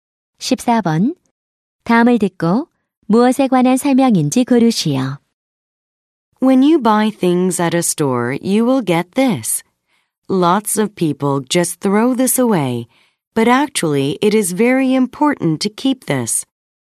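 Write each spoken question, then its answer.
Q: 다음을 듣고 무엇에 관한 설명인지 고르시오.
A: 영수증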